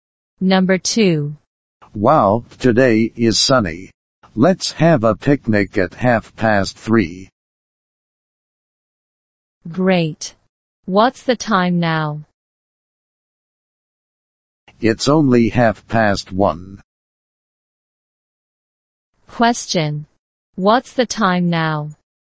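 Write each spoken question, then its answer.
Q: What's the time now?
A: 1:30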